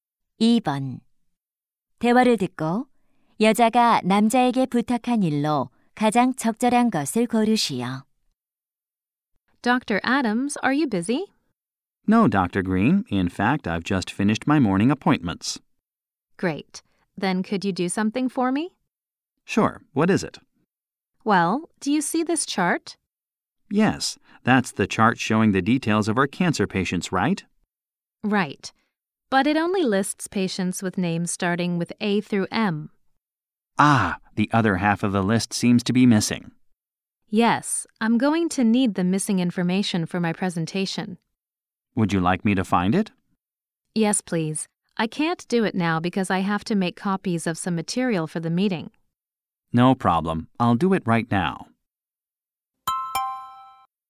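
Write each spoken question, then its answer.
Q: 대화를 듣고 여자가 남자에게 부탁한 일로 가장 적절한 것을 고르시오.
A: 빠진 환자 정보 찾아주기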